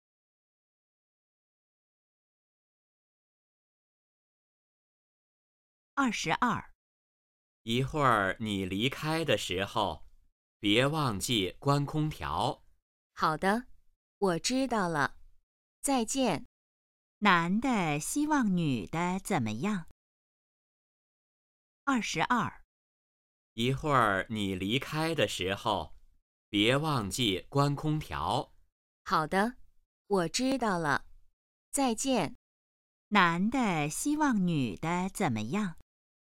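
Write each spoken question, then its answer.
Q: 男的希望女的怎么样?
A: 离开时关空调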